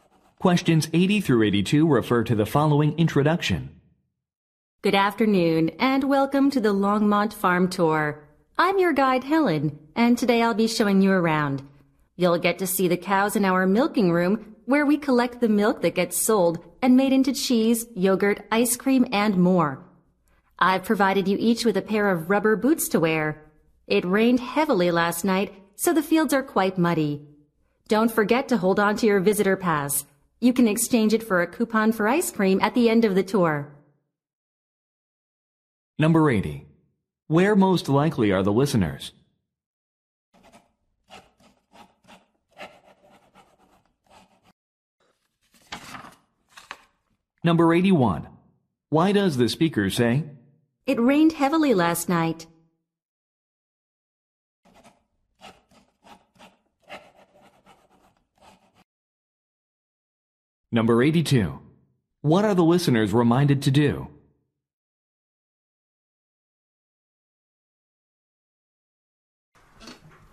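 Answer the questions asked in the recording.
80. On a farm
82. Keep their visitor pass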